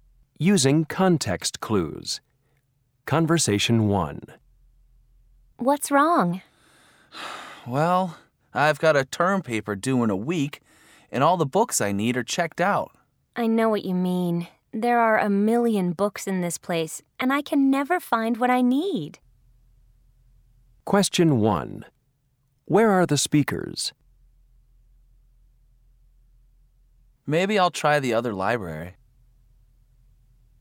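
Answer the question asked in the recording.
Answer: In a library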